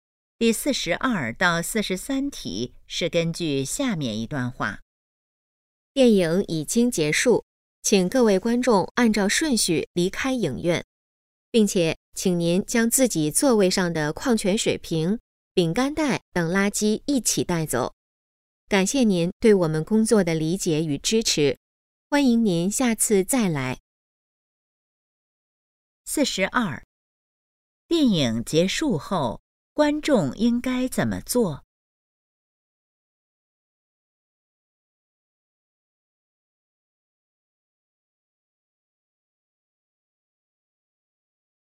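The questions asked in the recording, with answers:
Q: 电影结束后,观众应该怎么做?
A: 按顺序离开,带走垃圾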